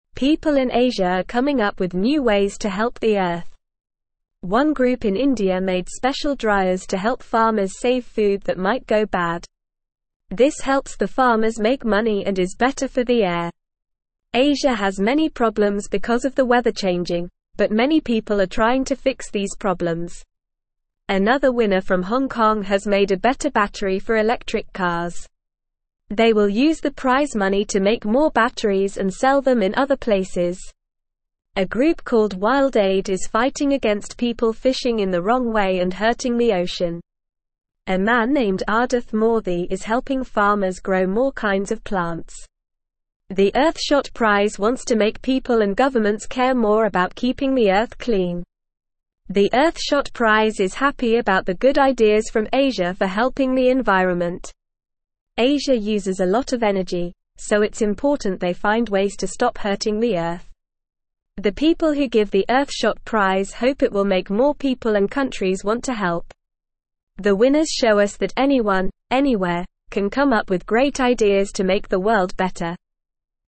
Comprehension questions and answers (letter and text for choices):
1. People in (1)______ are coming up with new ways to (2)______ the Earth.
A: Asia

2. People in (1)______ are coming up with new ways to (2)______ the Earth.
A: help

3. One group in India (3)______ special dryers to help farmers save food that might go bad.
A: made

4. Asia has many problems because of the weather changing, but many people are (4)______ to fix these (5)______.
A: trying

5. Another winner from (6)______ Kong has made a better battery for electric cars.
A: Hong

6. A group called WildAid is fighting against people fishing in the wrong way and hurting the (7)______.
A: ocean

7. A man named Aadith Moorthy is helping farmers grow more (8)______ of plants.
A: kinds

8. Asia uses a lot of energy, so it's (10)______ they find ways to stop hurting the Earth.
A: important

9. The people who give the Earthshot Prize hope it will (11)______ more people and (12)______ want to help.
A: make

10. The people who give the Earthshot Prize hope it will (11)______ more people and (12)______ want to help.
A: countries

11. What are people in Asia doing to help the Earth?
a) Ignoring the problems caused by changing weather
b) Coming up with new ways to fix problems caused by changing weather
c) Making the weather change even more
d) Moving to a different continent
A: b) Coming up with new ways to fix problems caused by changing weather

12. What did a group in India make to help farmers save food?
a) Special refrigerators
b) Special ovens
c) Special dryers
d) Special washing machines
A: c) Special dryers

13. How does using the special dryers help the farmers?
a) It makes their food go bad faster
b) It helps them lose money and is worse for the air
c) It has no effect on their money or the air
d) It helps them make money and is better for the air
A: d) It helps them make money and is better for the air

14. What did a winner from Hong Kong make for electric cars?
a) A better engine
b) A better steering wheel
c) A better battery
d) A better horn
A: c) A better battery

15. What will the winner do with the prize money?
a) Buy a new car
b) Make more batteries and sell them in other places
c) Go on vacation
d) Give the money to charity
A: b) Make more batteries and sell them in other places

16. Who is helping farmers grow more kinds of plants?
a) WildAid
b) The Earthshot Prize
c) The group in India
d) Aadith Moorthy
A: d) Aadith Moorthy

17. What does The Earthshot Prize hope to do?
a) Make more people and countries want to help the Earth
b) Make more people and countries want to hurt the Earth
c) Make more people and countries want to ignore the Earth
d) Make more people and countries want to leave the Earth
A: a) Make more people and countries want to help the Earth

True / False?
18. The special dryers made by a group in India help farmers save food that might go bad, which is good for the air and helps the farmers make money.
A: True

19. People in Asia are not finding new ways to help the Earth, like making special dryers to save food and making better batteries for electric cars.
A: False

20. A group called WildAid is fighting against people who fish in the wrong way and hurt the ocean.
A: True

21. Aadith Moorthy is helping farmers grow more kinds of plants.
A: True

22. Asia does not use a lot of energy, so it's not important for them to find ways to stop hurting the Earth.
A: False

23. The winners of the Earthshot Prize do not show that anyone, anywhere can come up with great ideas to make the world better.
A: False

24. The Earthshot Prize wants to make people and governments care more about keeping the Earth clean.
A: True

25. The Earthshot Prize is not happy about the good ideas from Asia for helping the environment.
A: False

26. What did a group in India create to help farmers save food?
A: The group in India made special dryers for farmers to save food from going bad.

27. Why is it good for farmers to save food that might go bad?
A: It helps farmers make more money and it's also better for the air.

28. What is the person from Hong Kong doing with the prize money?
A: They will use the prize money to make more batteries for electric cars and sell them in different places.

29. How is Aadith Moorthy helping farmers?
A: Aadith Moorthy is helping farmers grow more types of plants.

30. What does the Earthshot Prize want people and governments to do?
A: The Earthshot Prize wants people and governments to care more about keeping the Earth clean.

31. Why is it important for Asia to find new ways to help the Earth?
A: It's important because Asia uses a lot of energy, so they need to find ways to stop hurting the Earth.

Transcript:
People in Asia are coming up with new ways to help the Earth. One group in India made special dryers to help farmers save food that might go bad. This helps the farmers make money and is better for the air. Asia has many problems because of the weather changing, but many people are trying to fix these problems.
Another winner from Hong Kong has made a better battery for electric cars. They will use the prize money to make more batteries and sell them in other places. A group called WildAid is fighting against people fishing in the wrong way and hurting the ocean. A man named Aadith Moorthy is helping farmers grow more kinds of plants.
The Earthshot Prize is happy about the good ideas from Asia for helping the environment. Asia uses a lot of energy, so it's important they find ways to stop hurting the Earth. The people who give the Earthshot Prize hope it will make more people and countries want to help. The winners show us that anyone, anywhere, can come up with great ideas to make the world better.

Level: Level 2